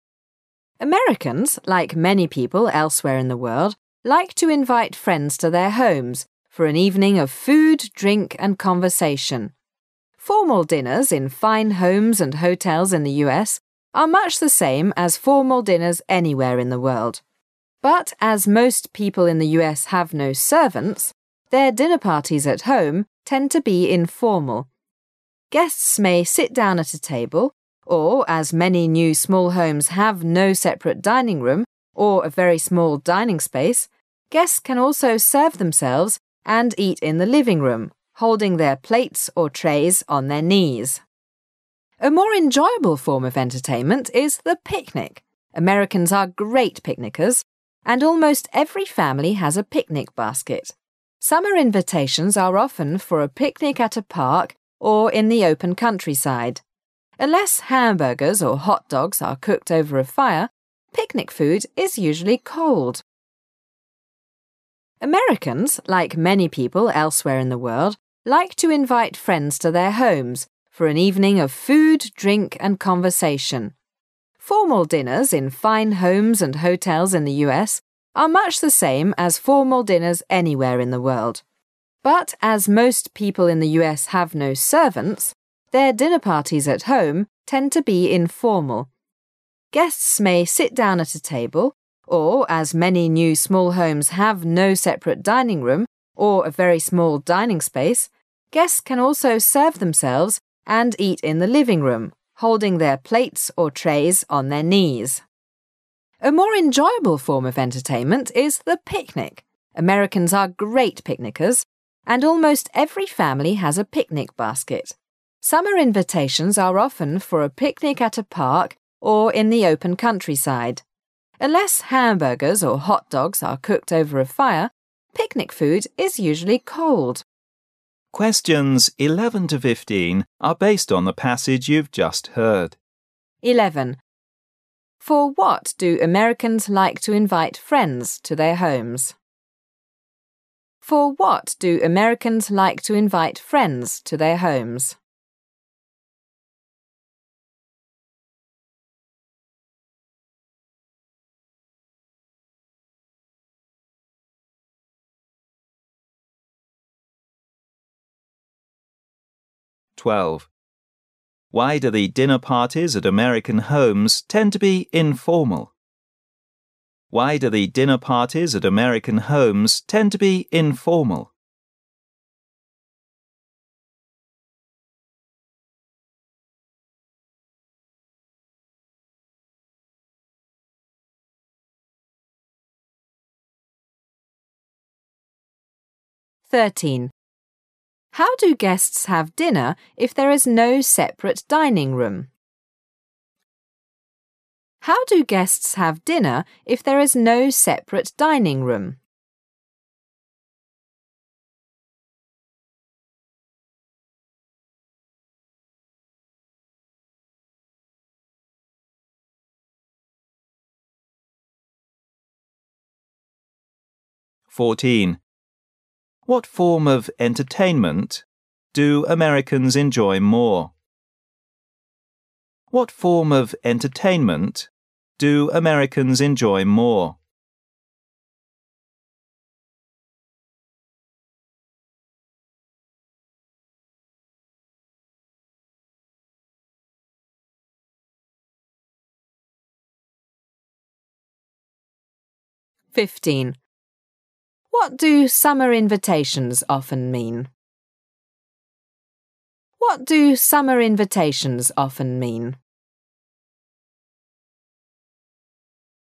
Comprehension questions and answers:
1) Q: For what do Americans like to invite friends to their homes? Americans like to invite friends to their homes for______.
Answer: an evening of food,drink and conversation

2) Q: Why do the dinner parties at American homes tend to be informal? Because______, their dinner parties at home tend to be informal.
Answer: most people in the U.S have no servants

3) Q: How do guests have dinner if there is no separate dinning room? Guests an______.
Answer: serve themselves and eat in the living room

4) Q: What form of entertainment so Americans enjoy more? A more enjoyable form of entertainment is______.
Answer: the picnic

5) Q: What do summer invitations often mean? Summer invitations are often for______.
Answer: a picnic at a park or in the open countryside

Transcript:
[解析] 11-15 Americans, like many people elsewhere in the world, like to invite friends to their homes for en evening of food, drink and conversation. Formal dinners in fine homes and hotels in the U. are much the same as formal dinners anywhere in the world. But as most people in the U. have no servants, their dinner parties at home tend to be informal. Guests may sit sown at a table ,or, as many new small homes have no separate dining room or very small dining space, guests can also serve themselves and eat in the living room ,holding their plates or trays on their knees. A more enjoyable form of entertainment is the picnic. Americans are great picnickers and almost every family has a picnic basket. Summer invitations are often for a picnic at a park or in the open countryside. Unless hamburgers or hot dogs are cooked over a fire, picnic food is usually cold.
[解析] Why do the dinner parties at American homes tend to be informal?
[解析] How do guests have dinner if there is no separate dinning room?
Q: What form of entertainment so Americans enjoy more?
the picnic
[解析] What form of entertainment to Americans enjoy more?
[解析] What do summer invitations often mean?